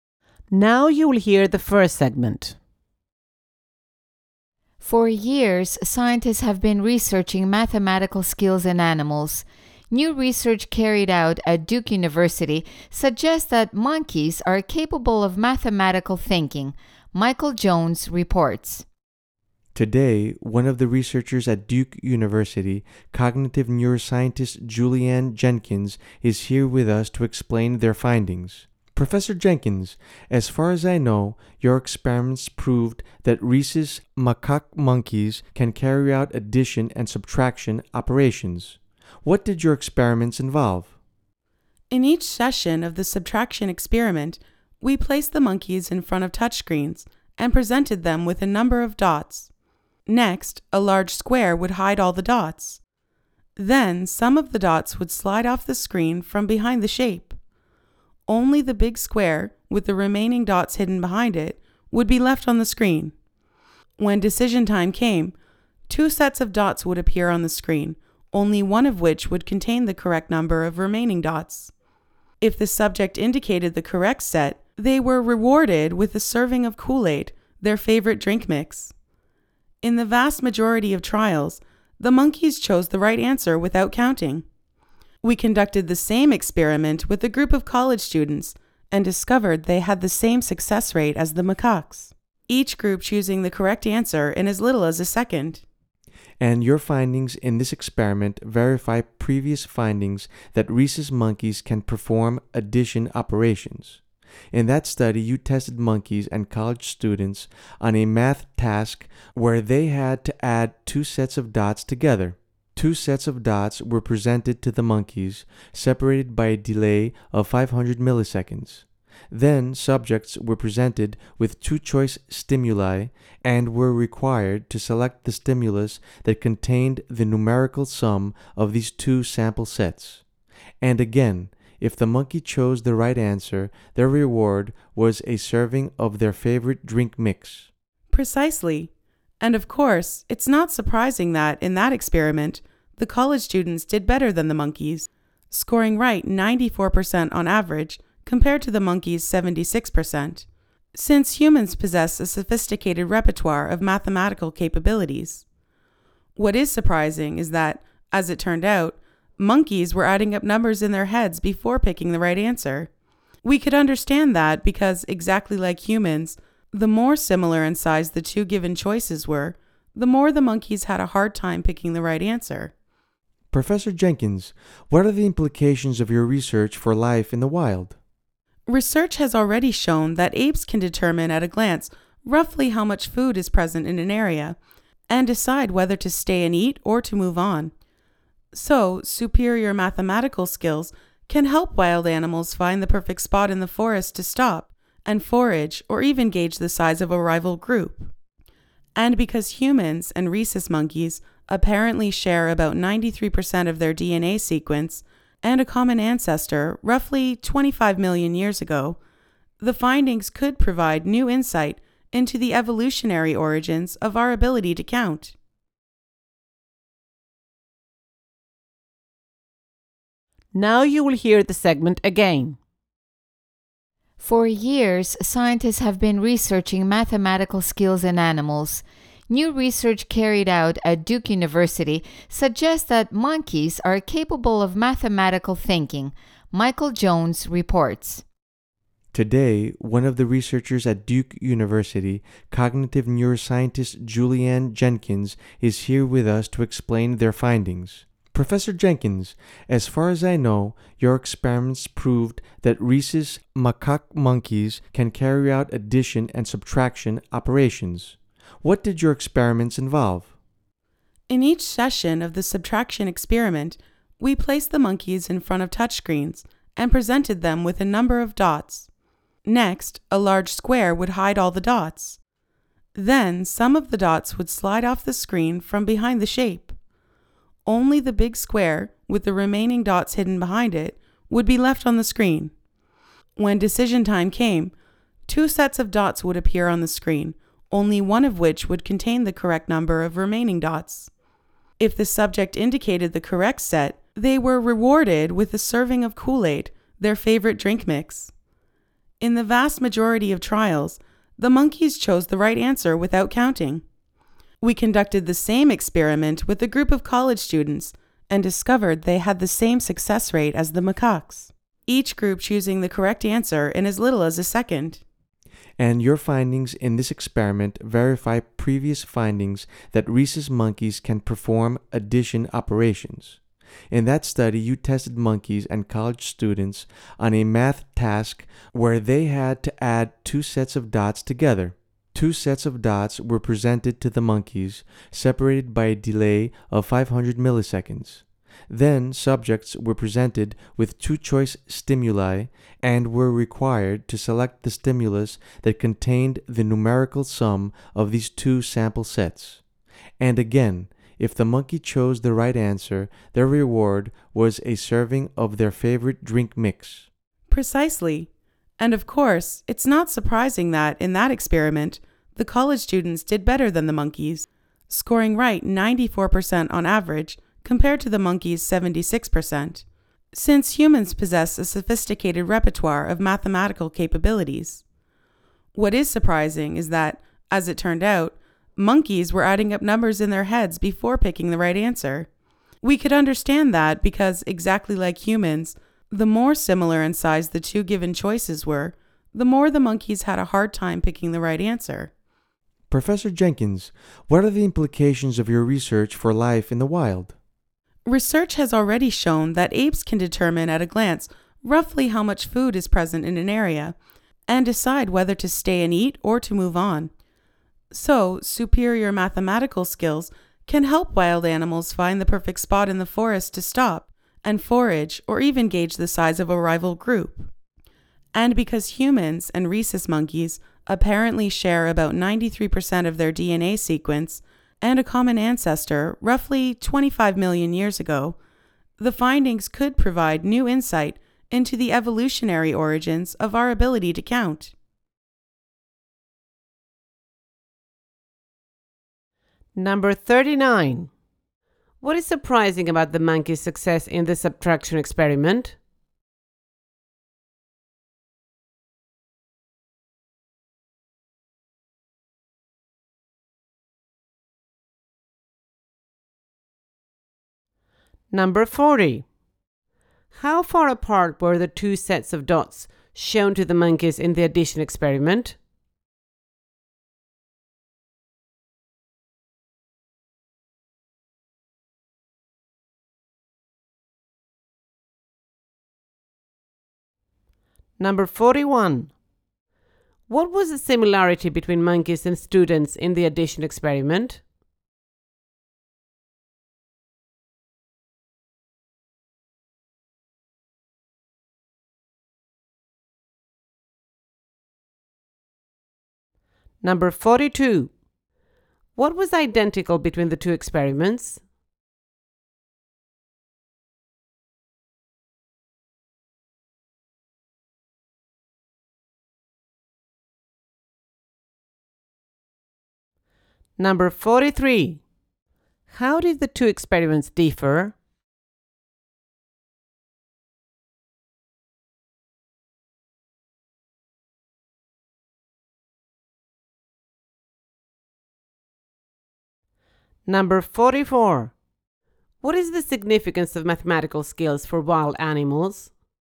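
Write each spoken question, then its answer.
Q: What is surprising about the monkey's success in the subtraction experiment?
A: They chose the right answer without counting, as successfully and quickly as college students

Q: How far apart were the two sets of dots shown to the monkeys in the addition experiment?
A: 500 milliseconds apart

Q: What was the similarity between monkeys and students in the addition experiment?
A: Both found it harder to pick the right answer when the two choices were closer in size

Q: What is the significance of mathematical skills for wild animals?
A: They help animals find good places to forage and gauge the size of rival groups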